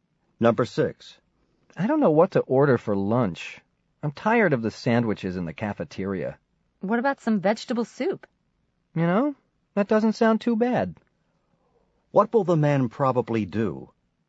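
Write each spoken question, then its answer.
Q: What will the man probably do?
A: Order vegetable soup.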